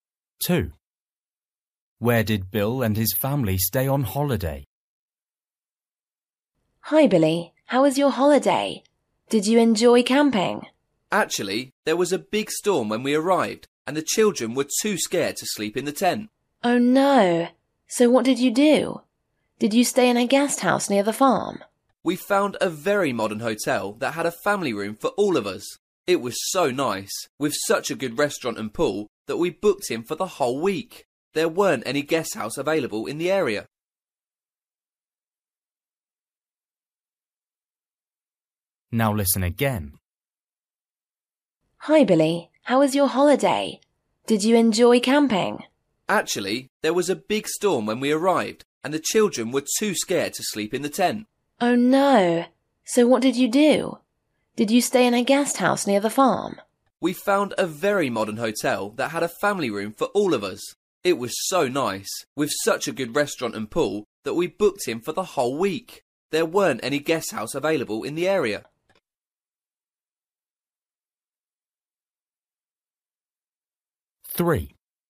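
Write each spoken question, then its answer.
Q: Where did Bill and his family stay on holiday?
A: In a modern hotel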